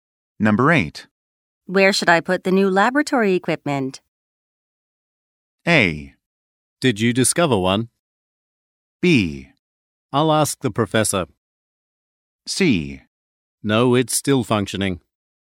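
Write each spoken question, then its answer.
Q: Where should I put the new laboratory equipment?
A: B: I'll ask the professor.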